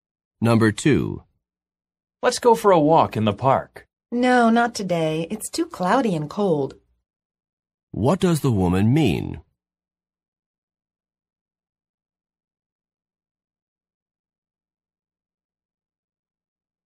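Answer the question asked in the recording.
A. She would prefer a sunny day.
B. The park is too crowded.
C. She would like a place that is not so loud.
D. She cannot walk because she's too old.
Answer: A. She would prefer a sunny day.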